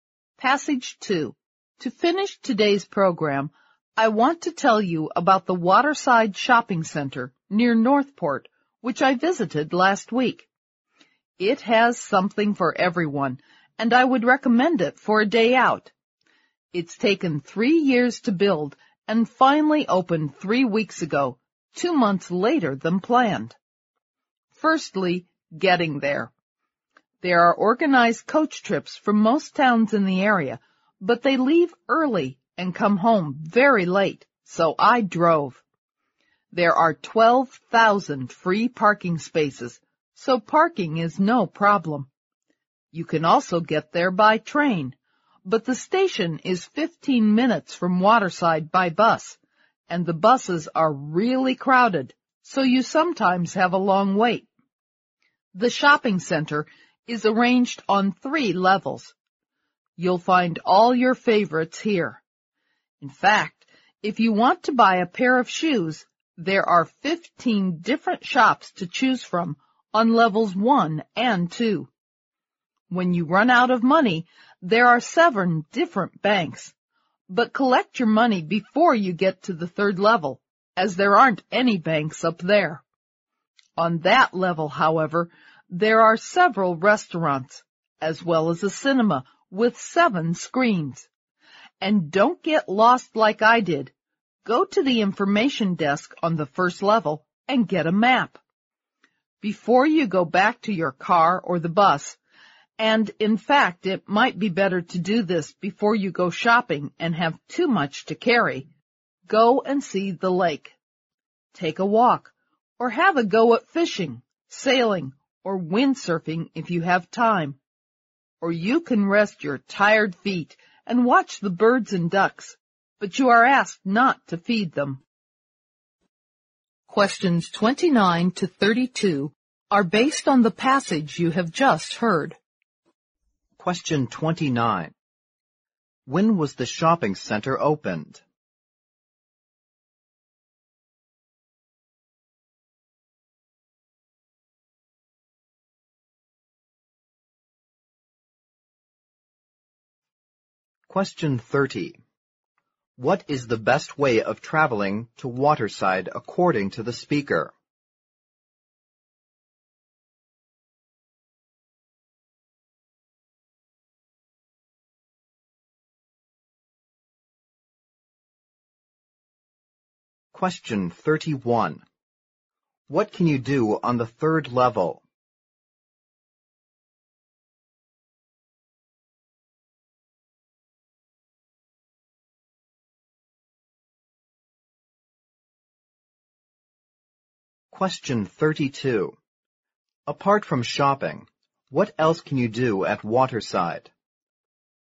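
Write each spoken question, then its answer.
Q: When was the shopping center opened?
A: 3 weeks ago

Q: What is the best way of traveling to Waterside according to the speaker?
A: By car

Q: What can you do on the 3rd level?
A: Eat at restaurants or see a film at the cinema

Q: Apart from shopping, what else can you do at Waterside?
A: Walk, fish, sail or windsurf at the lake, or watch the birds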